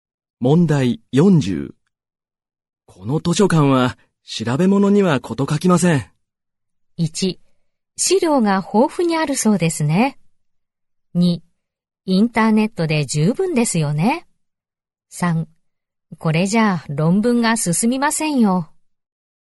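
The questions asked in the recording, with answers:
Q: この図書館は調べ物にはこと書きません。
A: 1: 資料が豊富にあるそうですね。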